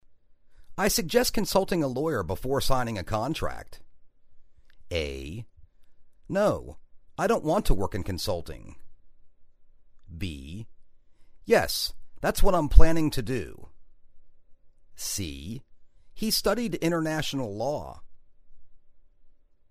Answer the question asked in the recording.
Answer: Yes, that's what I'm planning to do.